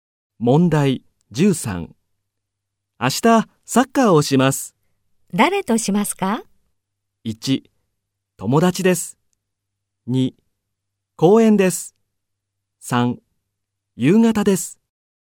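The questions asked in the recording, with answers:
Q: 誰としますか?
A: 1: 友達です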